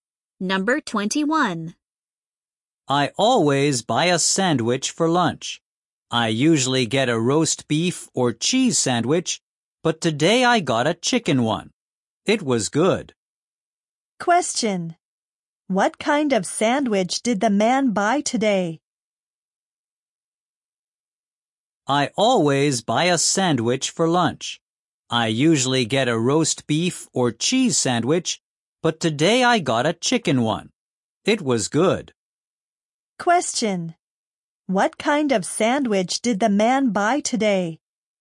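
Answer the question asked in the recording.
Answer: A chicken sandwich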